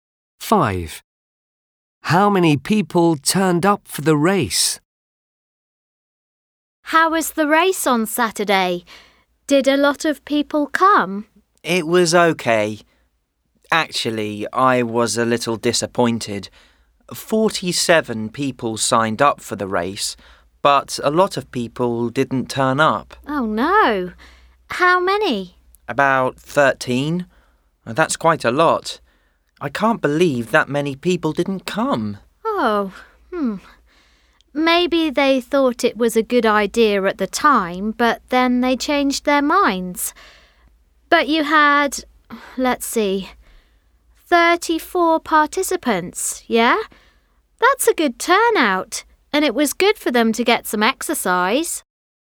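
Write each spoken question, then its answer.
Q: How many people turned up for the race?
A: 34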